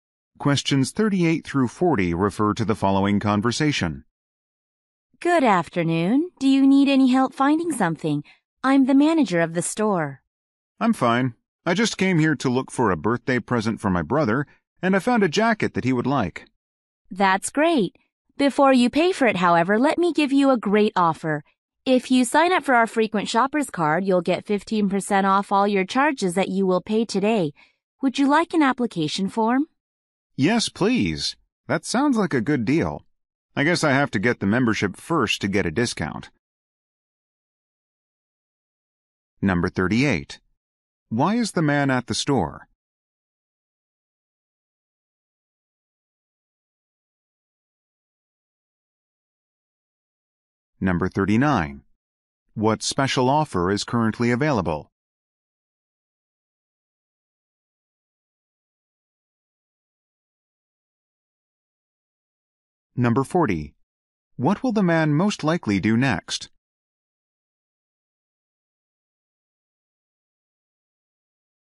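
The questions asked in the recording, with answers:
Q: Why is the man at the store?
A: To buy a birthday present for his brother

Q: What special offer is currently available?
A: 15% off with a frequent shoppers card

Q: What will the man most likely do next?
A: Fill out an application form for the membership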